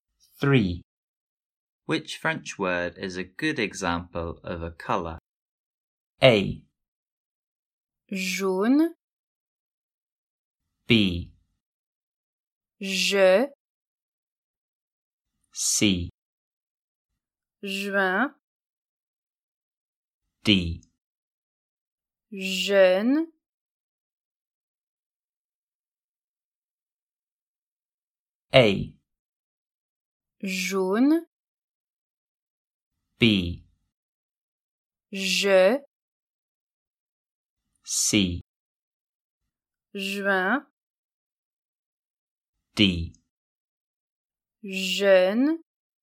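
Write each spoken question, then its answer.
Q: Which French word is a good example of a colour?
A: A: Jaune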